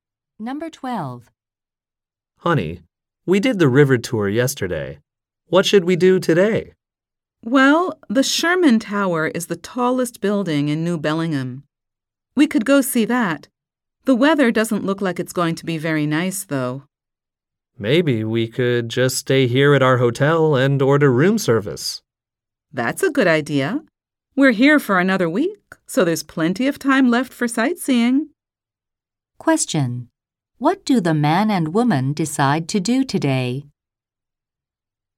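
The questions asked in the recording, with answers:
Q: What do the man and woman decide to do today?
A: Stay at their hotel and order room service.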